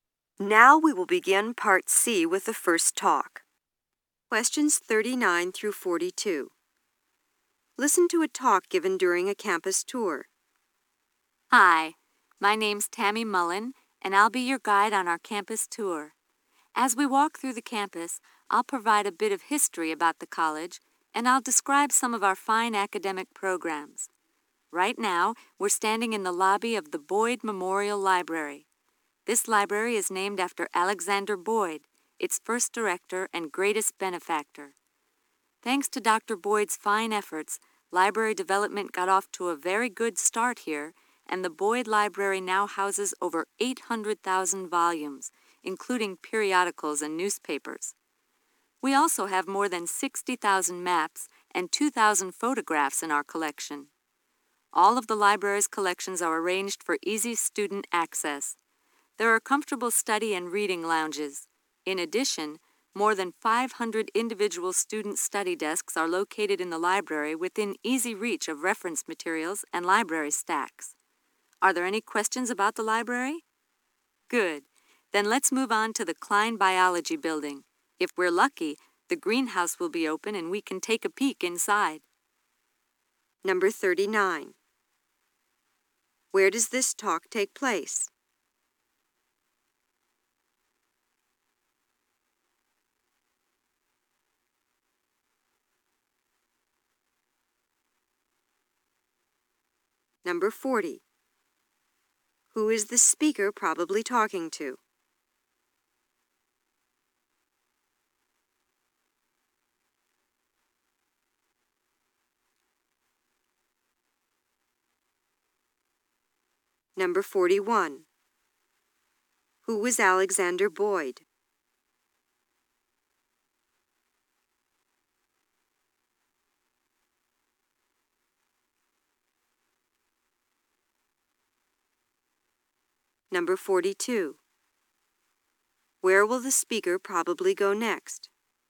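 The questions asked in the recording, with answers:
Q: Where does this talk take place?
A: In the lobby of the Boyd Memorial Library

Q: Who is the speaker probably talking to?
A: Visitors on a campus tour

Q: Who was Alexander Boyd?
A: The library's first director and greatest benefactor

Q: Where will the speaker probably go next?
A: To the Klein Biology Building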